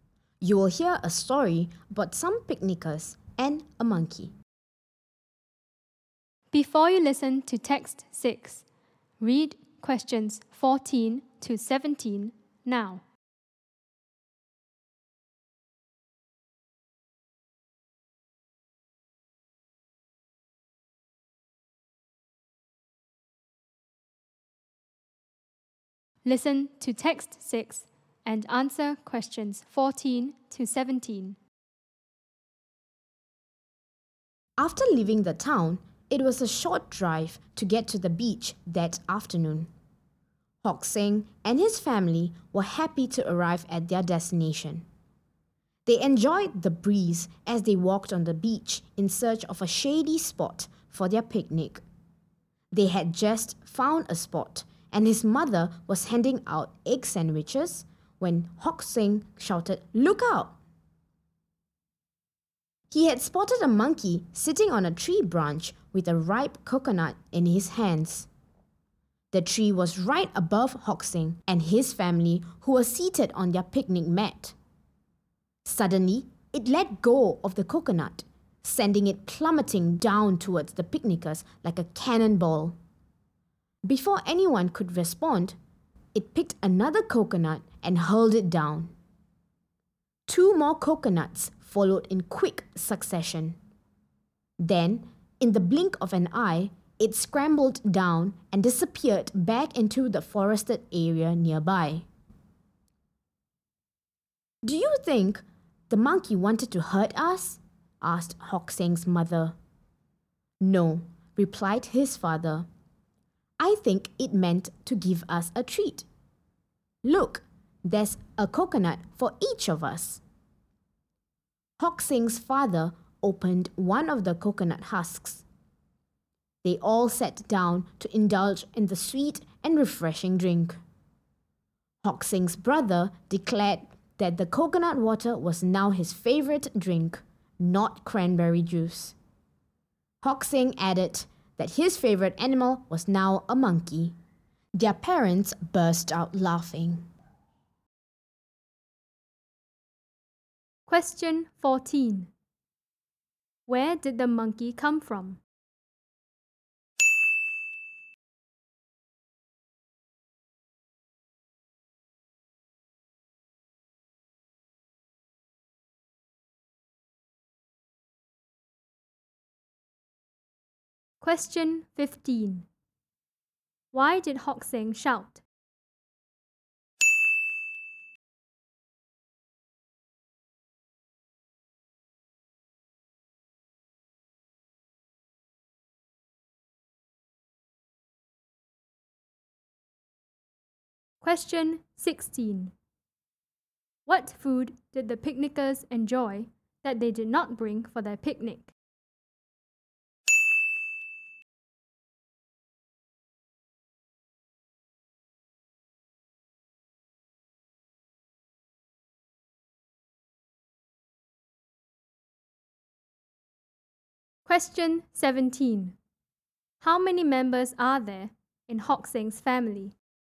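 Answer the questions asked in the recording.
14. The forested area near the beach
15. He saw a monkey holding a coconut in the tree right above them
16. Coconuts (coconut water)
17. Four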